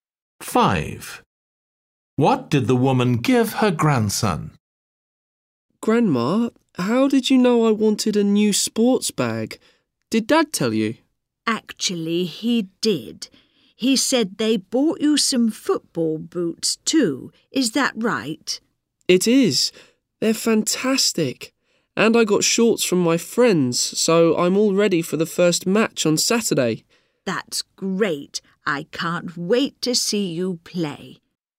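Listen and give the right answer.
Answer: a sports bag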